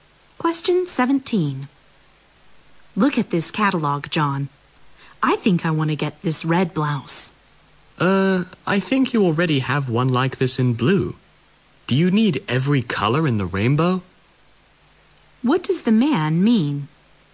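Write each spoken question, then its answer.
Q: What does the man mean?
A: The woman doesn't need another blouse just like one she already has.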